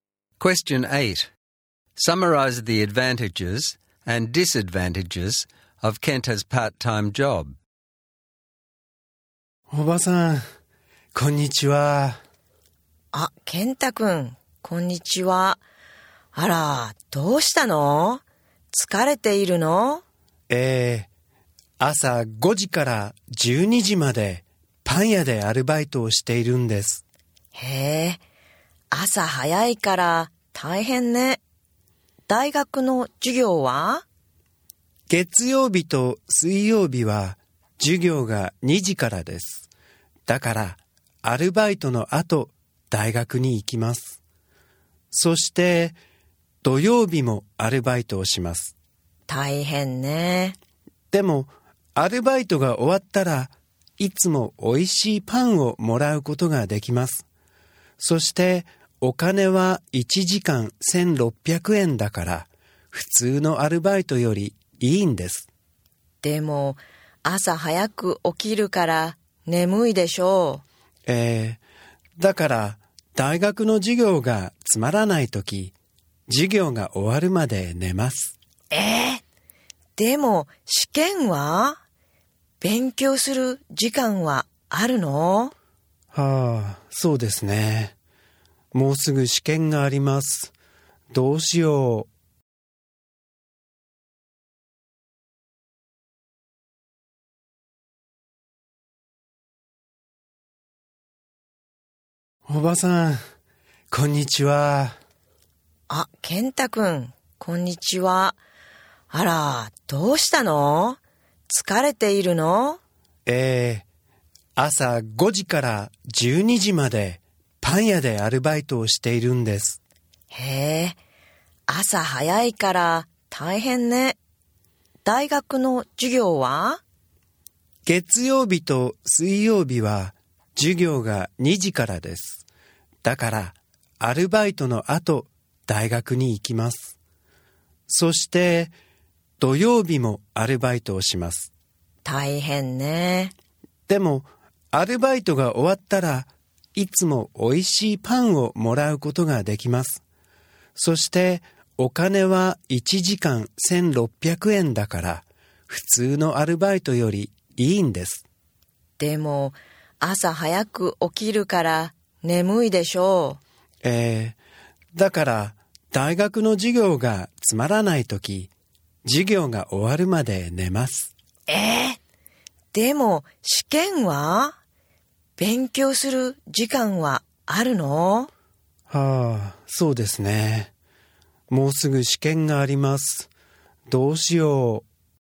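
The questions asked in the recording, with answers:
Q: Summarize the advantages and disadvantages of Kenta's part-time job.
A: Advantages: free bread and good pay (1600 yen an hour). Disadvantages: he starts early, is sleepy, sleeps in class and has no time to study for exams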